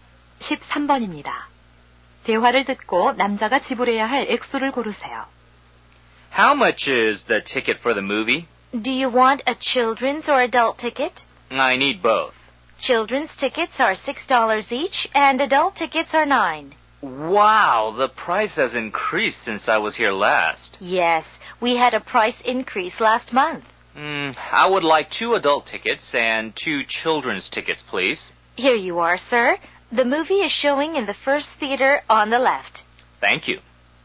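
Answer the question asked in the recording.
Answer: 30달러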